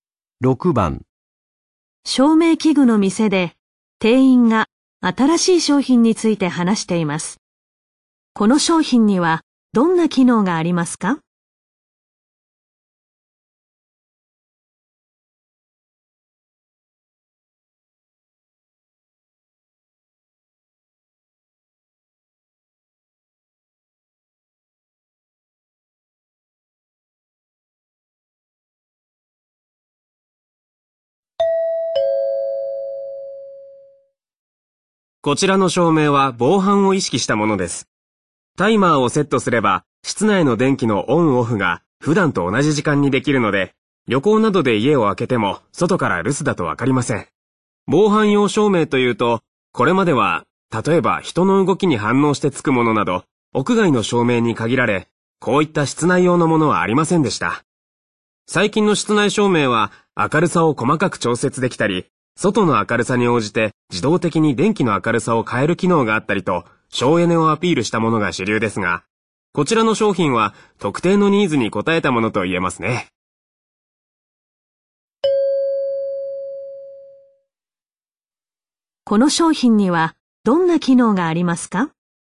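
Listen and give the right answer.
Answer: タイマーで室内の電気を普段と同じ時間にオンオフできる機能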